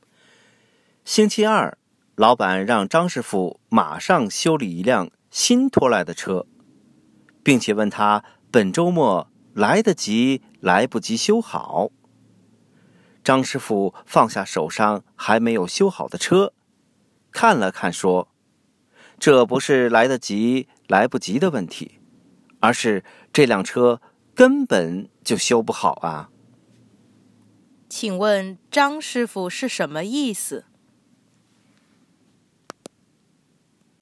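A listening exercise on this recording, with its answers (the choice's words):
Listen to the audio texts and questions, tick ONE correct answer to each question.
What does Master Zhang mean?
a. The car cannot be fixed at all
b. The car can be fixed with no problem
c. He has no time to fix another car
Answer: The car cannot be fixed at all

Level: Advanced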